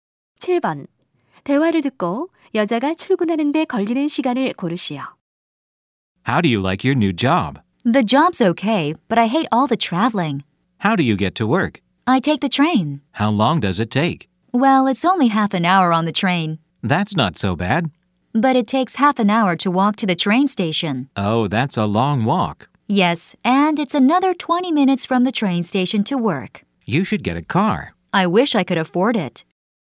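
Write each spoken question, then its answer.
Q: 대화를 듣고 여자가 출근하는데 걸리는 시간을 고르시오.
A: 1시간 20분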